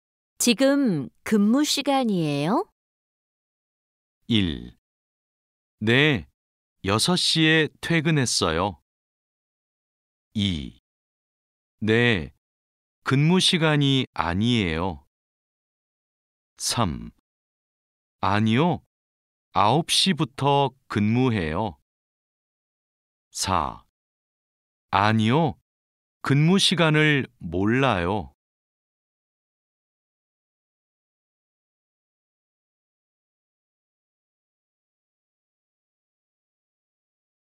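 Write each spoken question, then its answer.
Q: 지금 근무 시간이에요?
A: 3: 아니요, 9시부터 근무해요.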